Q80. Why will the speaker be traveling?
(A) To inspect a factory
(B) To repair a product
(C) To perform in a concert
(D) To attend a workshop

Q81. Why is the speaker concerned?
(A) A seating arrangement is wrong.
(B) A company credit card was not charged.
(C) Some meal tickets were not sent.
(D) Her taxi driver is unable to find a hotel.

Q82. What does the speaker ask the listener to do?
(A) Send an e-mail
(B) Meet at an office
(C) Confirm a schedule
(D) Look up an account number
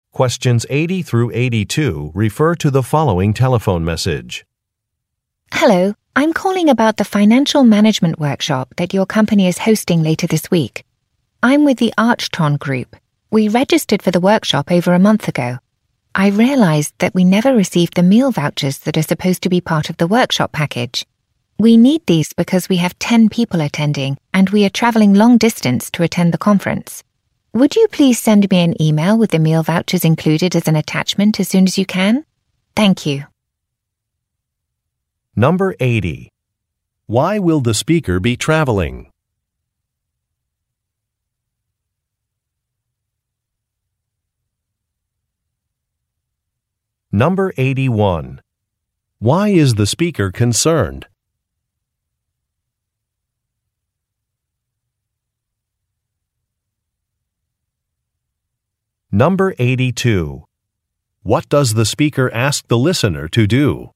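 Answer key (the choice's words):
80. To attend a workshop
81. Some meal tickets were not sent.
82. Send an e-mail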